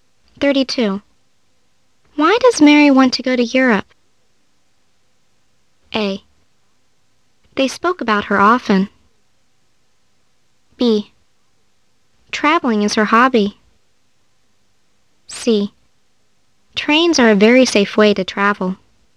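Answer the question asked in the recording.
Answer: B: Traveling is her hobby.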